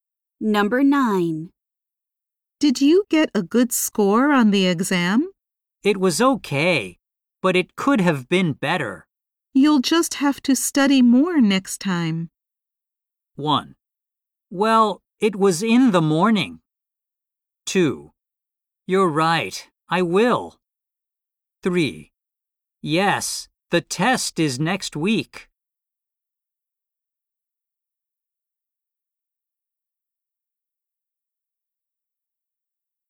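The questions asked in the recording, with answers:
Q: You'll just have to study more next time.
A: 2: You're right, I will.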